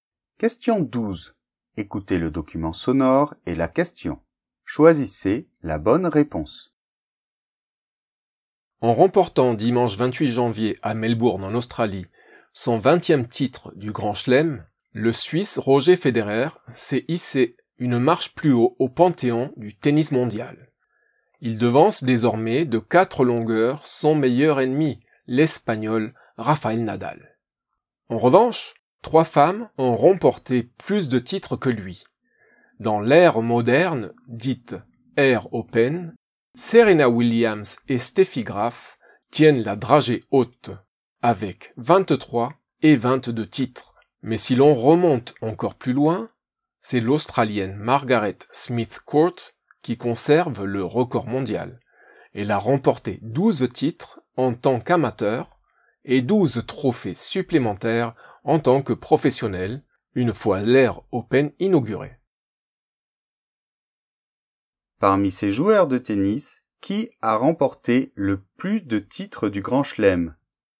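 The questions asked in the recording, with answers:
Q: Parmi ces joueurs de tennis, qui a remporté le plus de titres du Grand Chelem ?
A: Margaret Smith Court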